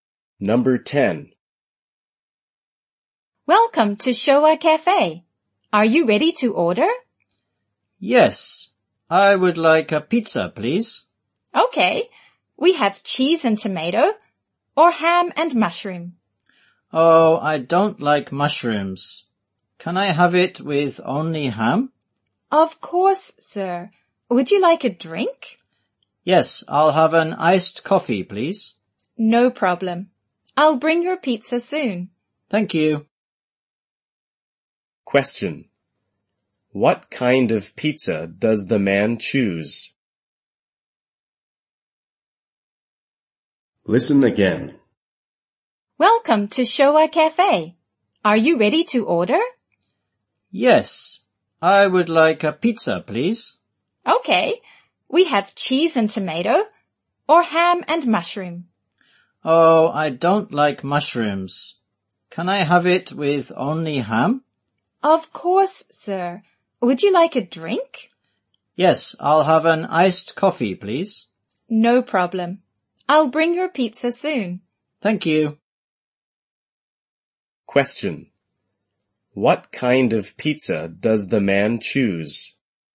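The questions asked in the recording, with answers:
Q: What kind of pizza does the man choose?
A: A ham pizza (ham only)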